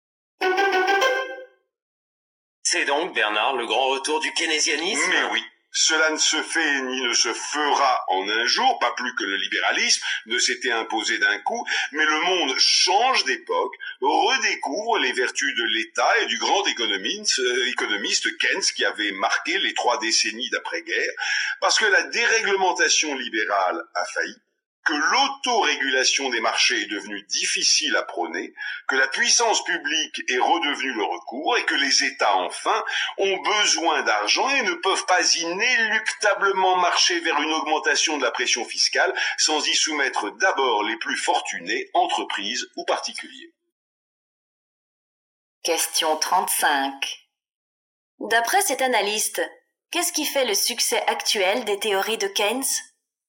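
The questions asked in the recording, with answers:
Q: D'après cet analyste, qu'est-ce qui fait le succès actuel des théories de Keynes ?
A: L'échec de la déréglementation libérale et le retour de l'État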